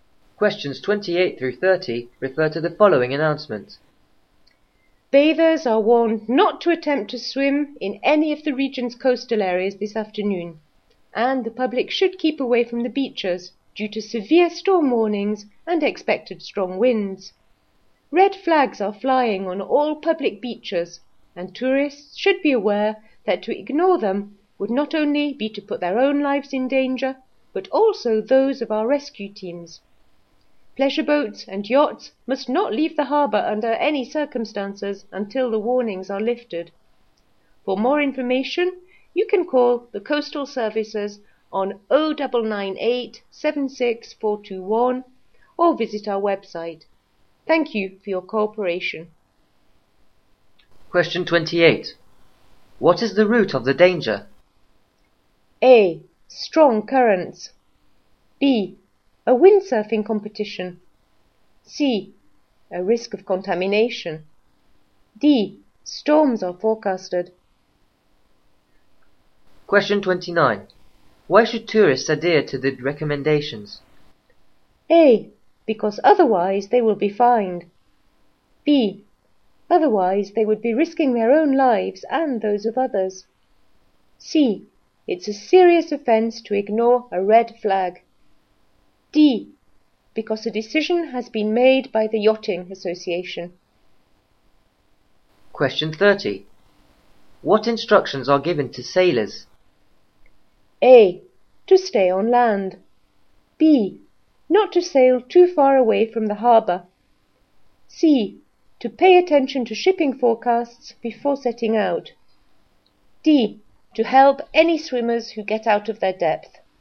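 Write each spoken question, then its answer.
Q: What is the root of the danger?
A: D: Storms are forecasted.

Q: Why should tourists adhere to the recommendations?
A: B: Otherwise they would be risking their own lives and those of others.

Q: What instructions are given to sailors?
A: A: To stay on land.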